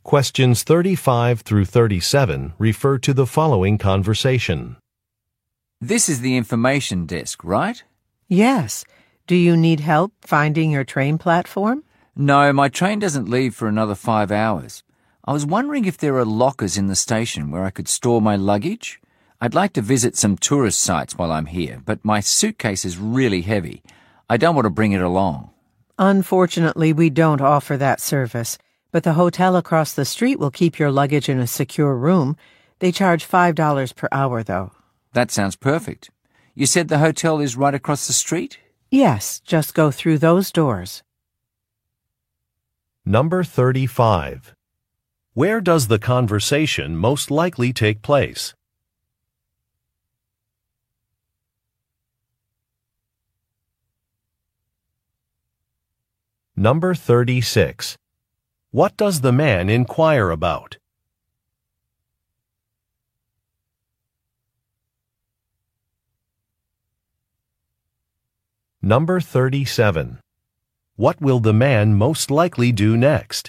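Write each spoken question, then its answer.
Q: Where does the conversation most likely take place?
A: At a train station information desk

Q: What does the man inquire about?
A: Lockers to store his luggage

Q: What will the man most likely do next?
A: Go to the hotel across the street to leave his luggage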